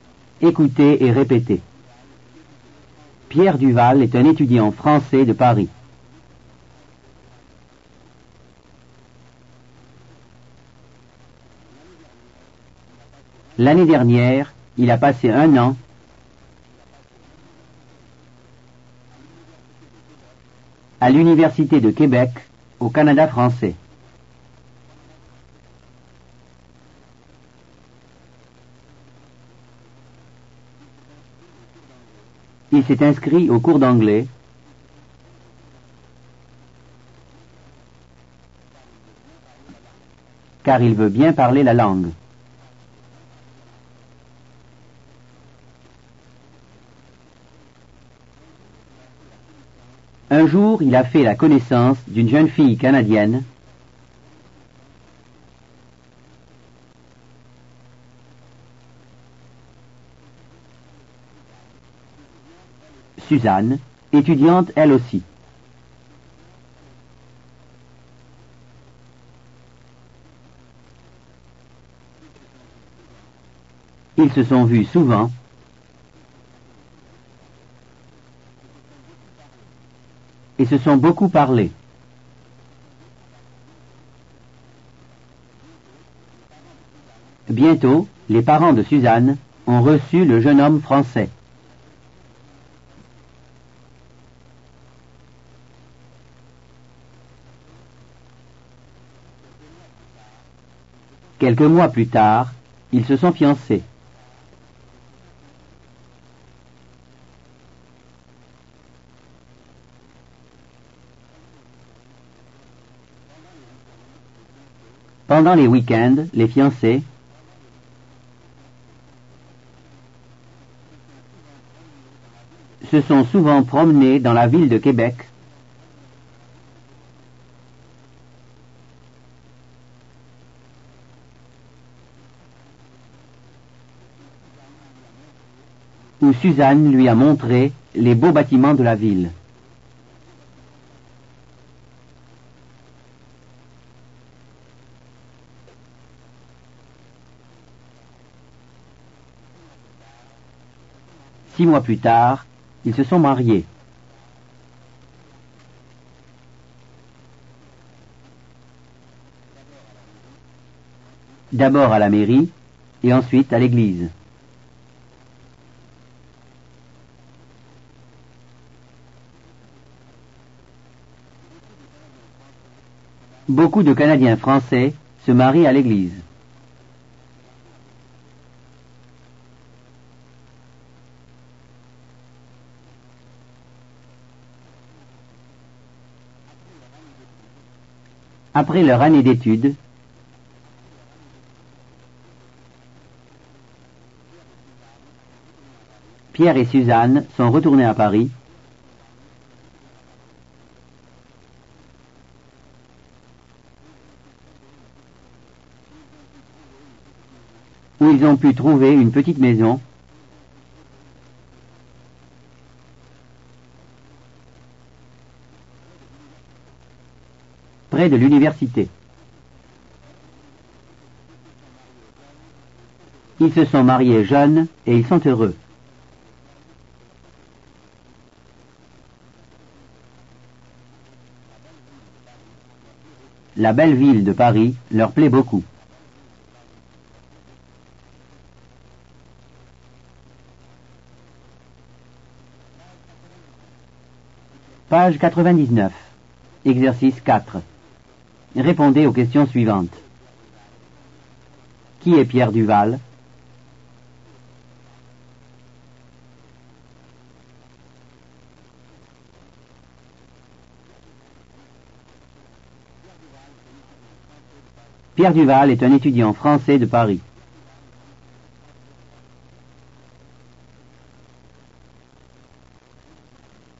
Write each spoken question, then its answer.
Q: Où est-ce qu'il habite?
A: il habite Paris.